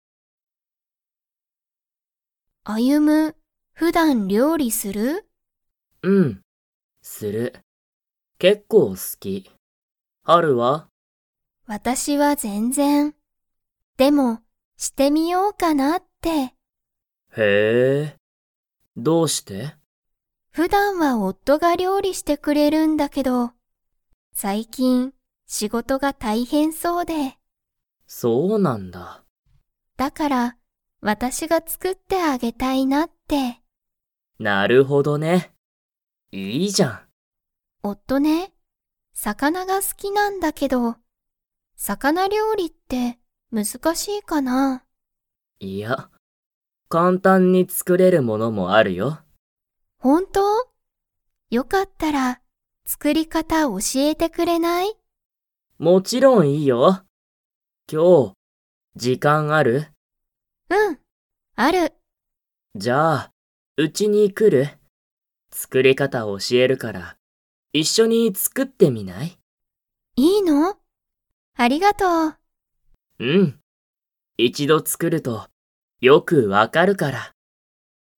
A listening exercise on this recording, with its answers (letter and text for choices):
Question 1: ハルは、普段ふだん____。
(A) 料理りょうりをする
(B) 料理りょうりをしない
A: (B) 料理りょうりをしない

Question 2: ハルは、____を教おしえてほしい。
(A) 魚料理さかなりょうりの作つくり方かた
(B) 普段ふだんやること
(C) 夫おっとの仕事しごと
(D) 今日きょうの時間じかん (じかん)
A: (A) 魚料理さかなりょうりの作つくり方かた

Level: Level 3